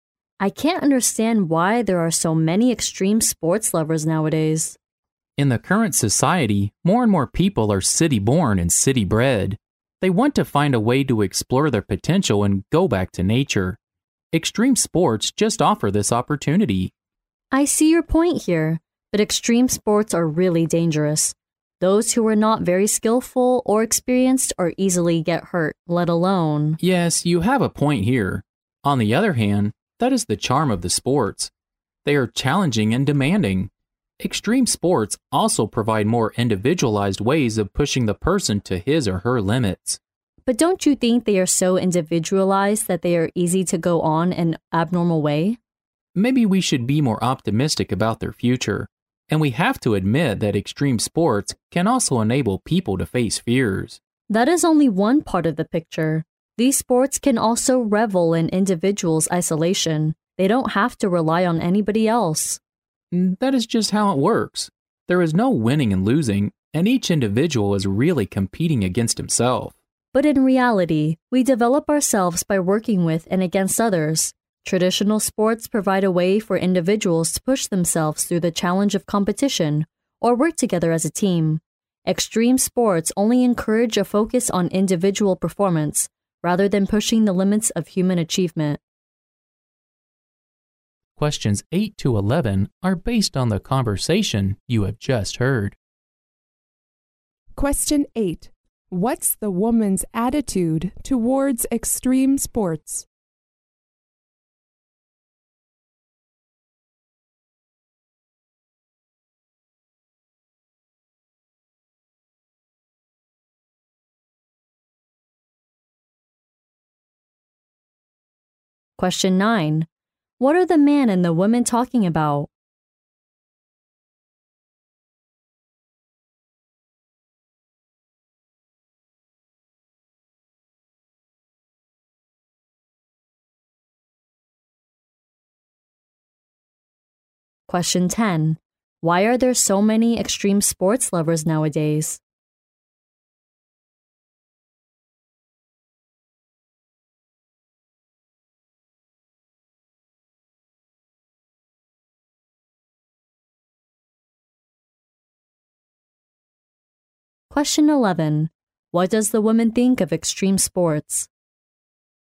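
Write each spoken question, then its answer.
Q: What are the man and the woman talking about?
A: Extreme sports

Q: Why are there so many extreme sports lovers nowadays?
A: City-born people want to explore their potential and go back to nature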